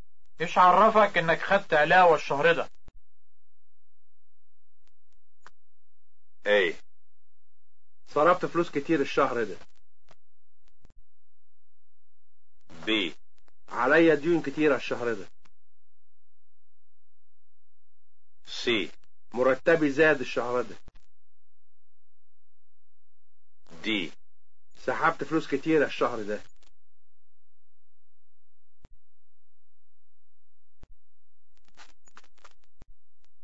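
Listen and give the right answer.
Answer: C: مرتبي زاد الشهر ده.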